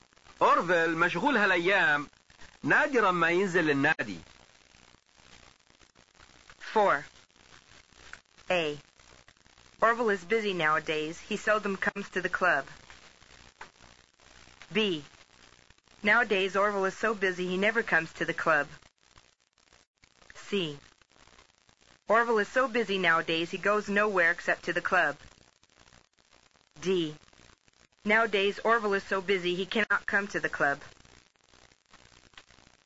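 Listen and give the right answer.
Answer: A: Orville is busy nowadays. He seldom comes to the club.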